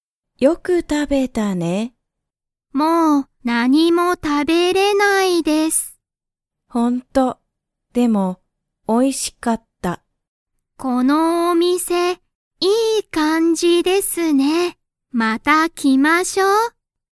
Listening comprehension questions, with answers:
リサコは、おいしかった、と言(い)いましたか?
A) はい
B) いいえ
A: はい

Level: Level 1

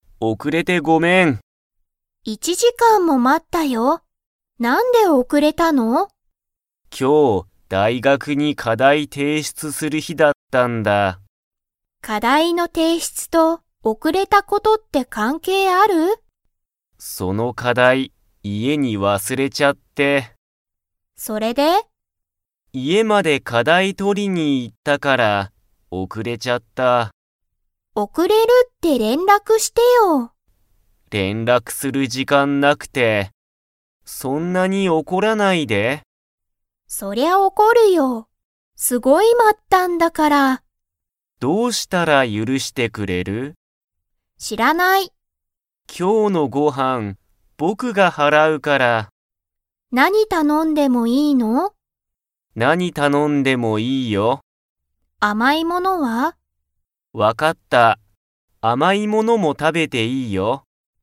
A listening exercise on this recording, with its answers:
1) しんごは、大学だいがくの課題かだいをどこに忘わすれましたか?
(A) 家いえ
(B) 大学だいがく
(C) 会社かいしゃ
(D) 駅えき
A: 家いえ

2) 今日きょうのご飯はんは、かおり 。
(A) が払はらう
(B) は払はらわない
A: は払はらわない

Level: Level 4

